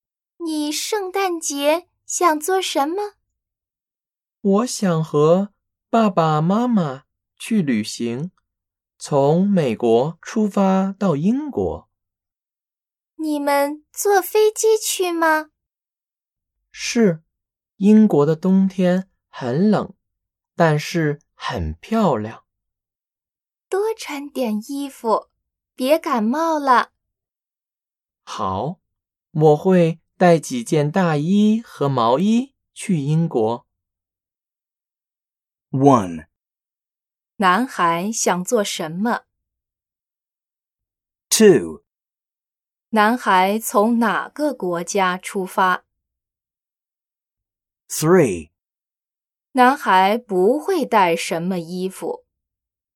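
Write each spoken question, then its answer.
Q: 男孩想做什么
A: 和爸爸妈妈去旅行

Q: 男孩从哪个国家出发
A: 美国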